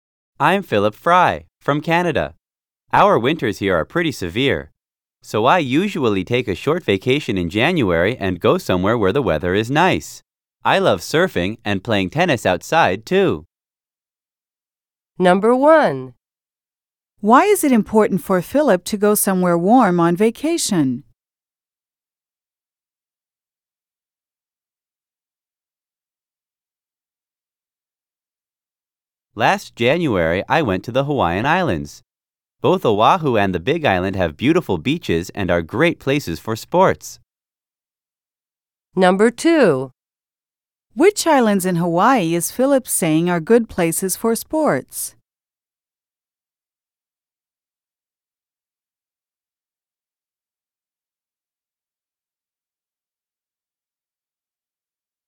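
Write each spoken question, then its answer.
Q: Why is it important for Philip to go somewhere warm on vacation?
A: The winters in Canada are very severe, and he loves surfing and playing tennis outside.

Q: Which islands in Hawaii is Philip saying are good places for sports?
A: Oahu and the Big Island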